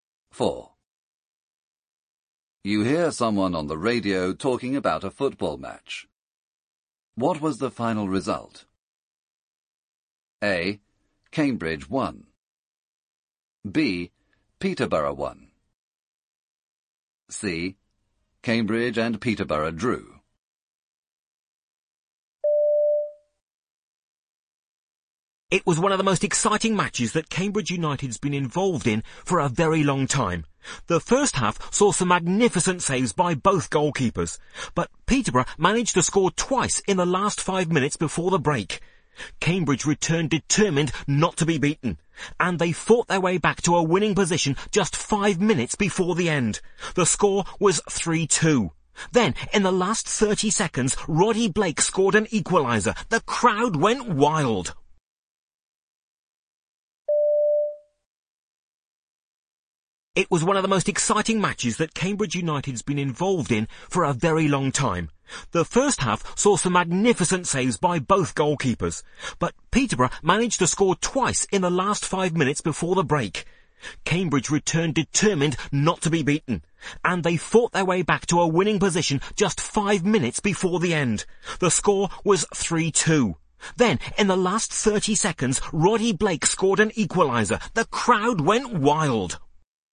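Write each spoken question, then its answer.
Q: What was the final result?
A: C: Cambridge and Peterborough drew.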